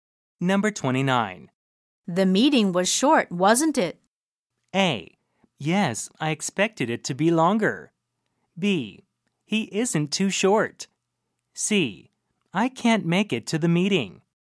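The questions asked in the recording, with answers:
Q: The meeting was short, wasn't it?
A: A: Yes, I expected it to be longer.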